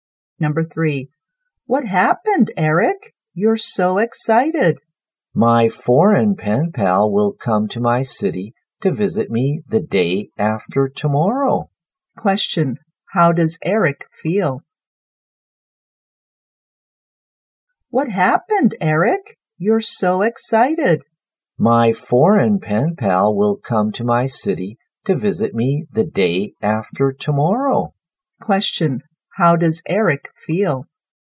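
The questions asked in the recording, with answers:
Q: How does Eric feel?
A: Excited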